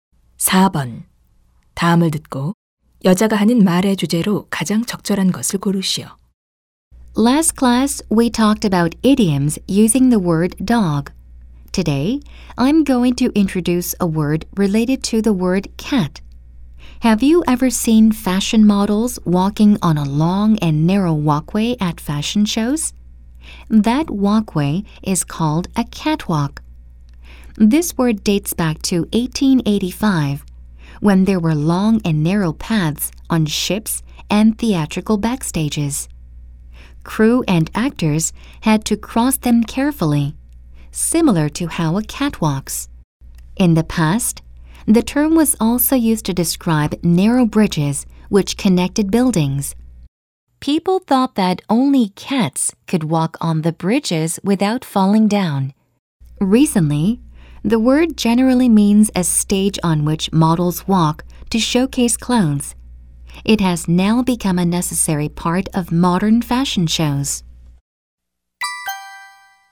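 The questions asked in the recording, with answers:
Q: 다음을 듣고 여자가 하는 말의 주제로 가장 적절한 것을 고르시오.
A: catwalk라는 단어의 유래와 의미 변화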